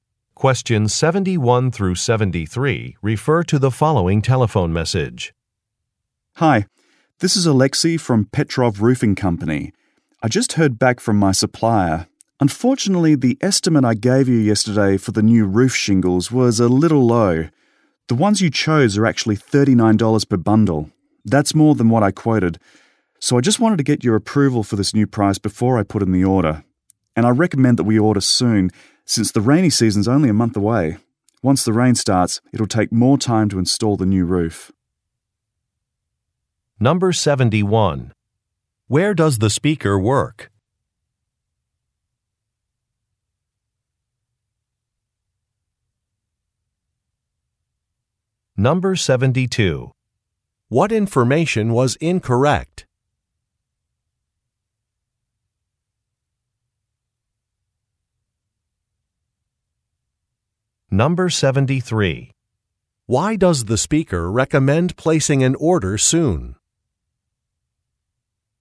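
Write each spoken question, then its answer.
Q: Where does the speaker work?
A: At a roofing company

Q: What information was incorrect?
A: The price estimate for the roof shingles

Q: Why does the speaker recommend placing an order soon?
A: The rainy season starts in a month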